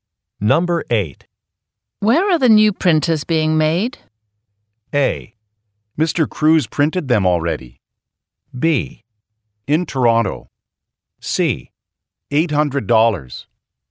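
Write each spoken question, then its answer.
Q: Where are the new printers being made?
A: B: In Toronto.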